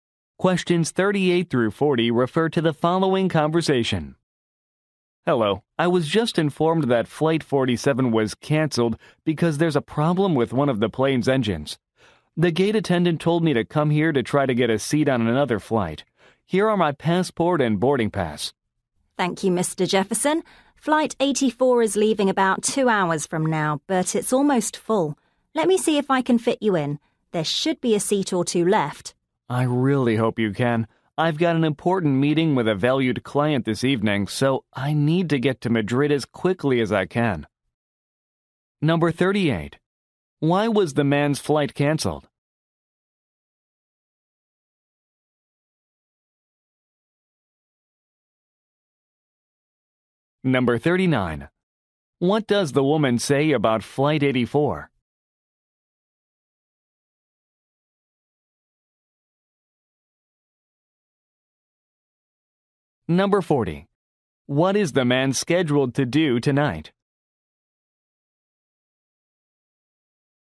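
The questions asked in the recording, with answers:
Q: Why was the man's flight canceled?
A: A problem with one of the plane's engines

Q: What does the woman say about Flight 84?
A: It is almost full

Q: What is the man scheduled to do tonight?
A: Meet an important client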